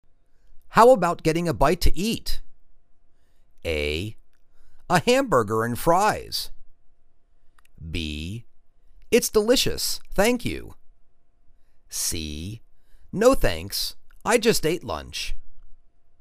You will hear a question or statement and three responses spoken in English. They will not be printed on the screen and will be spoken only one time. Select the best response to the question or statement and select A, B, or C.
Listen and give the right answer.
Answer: No thanks. I just ate lunch.